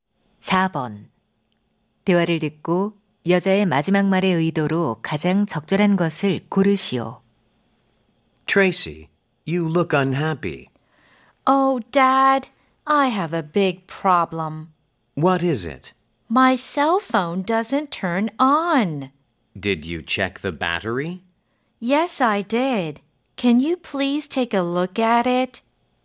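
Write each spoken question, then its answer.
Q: 대화를 듣고 여자의 마지막 말의 의도로 가장 적절한 것을 고르시오.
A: 요청 (휴대폰을 봐 달라고 부탁)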